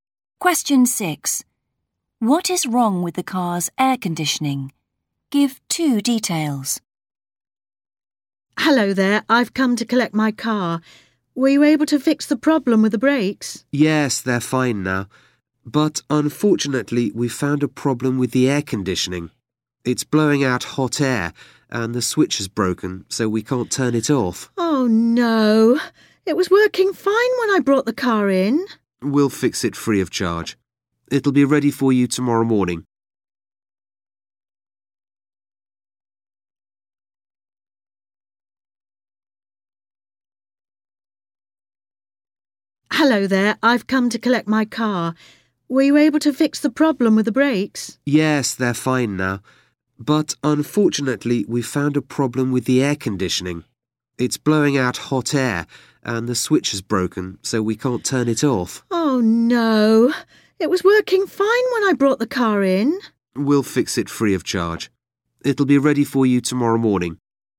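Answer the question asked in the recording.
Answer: it blows out hot air and the switch is broken, so it can't be turned off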